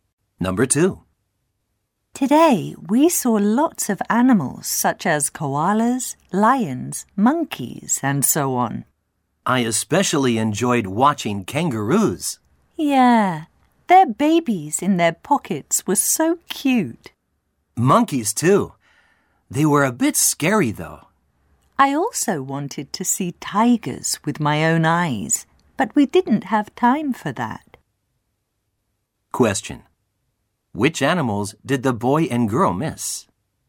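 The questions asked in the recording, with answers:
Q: Which animals did the boy and girl miss?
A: Tigers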